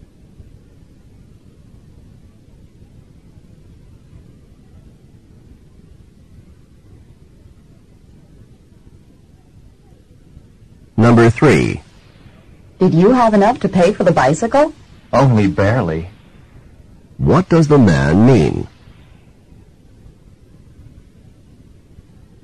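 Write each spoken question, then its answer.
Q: What does the man mean?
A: He barely had enough money for the bicycle.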